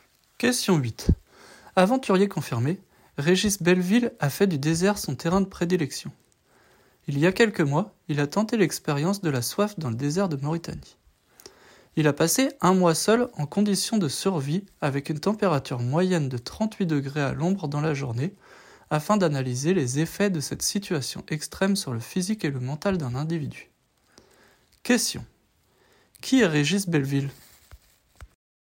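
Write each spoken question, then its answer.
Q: Qui est Régis Belleville ?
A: Un aventurier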